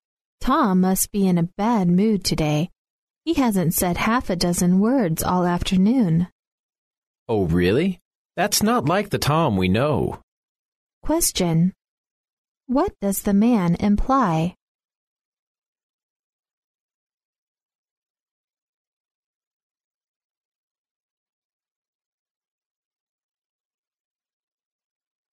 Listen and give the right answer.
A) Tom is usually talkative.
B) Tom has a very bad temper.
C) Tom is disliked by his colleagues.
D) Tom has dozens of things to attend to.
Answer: A) Tom is usually talkative.